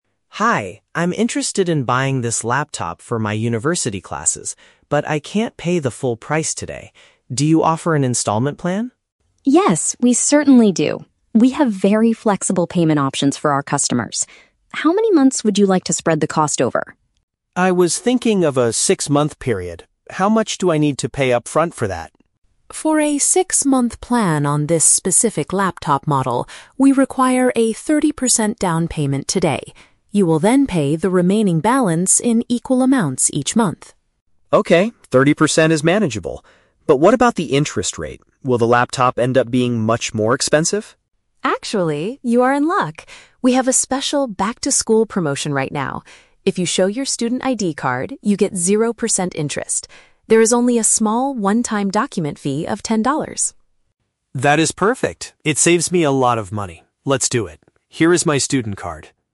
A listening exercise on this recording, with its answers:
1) Why does Leo ask for an installment plan?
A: He wants to buy a computer but cannot afford the total cost at once.

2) What is the initial requirement for the six-month payment option?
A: Providing a thirty percent deposit on the day of purchase.

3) How does the "back-to-school" promotion benefit Leo?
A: It allows him to spread out his payments without adding extra borrowing costs.

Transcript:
Leo: Hi, I'm interested in buying this laptop for my university classes, but I can't pay the full price today. Do you offer an installment plan?
Emma: Yes, we certainly do. We have very flexible payment options for our customers. How many months would you like to spread the cost over?
Leo: I was thinking of a six-month period. How much do I need to pay upfront for that?
Emma: For a six-month plan on this specific laptop model, we require a thirty percent down payment today. You will then pay the remaining balance in equal amounts each month.
Leo: Okay, thirty percent is manageable. But what about the interest rate? Will the laptop end up being much more expensive?
Emma: Actually, you are in luck. We have a special "back-to-school" promotion right now. If you show your student ID card, you get zero percent interest. There is only a small, one-time document fee of ten dollars.
Leo: That is perfect! It saves me a lot of money. Let's do it. Here is my student card.